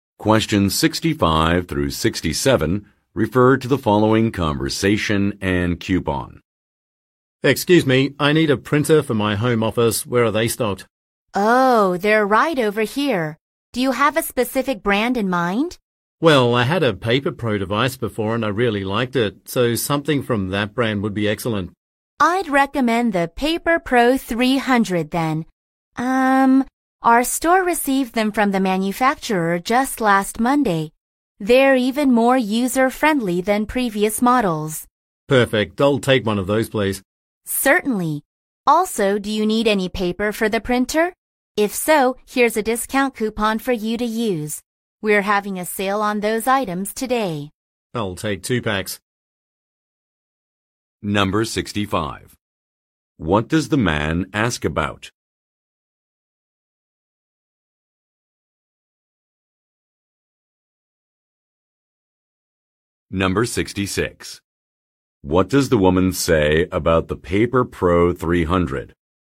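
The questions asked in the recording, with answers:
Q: What does the man ask about?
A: Where the printers are stocked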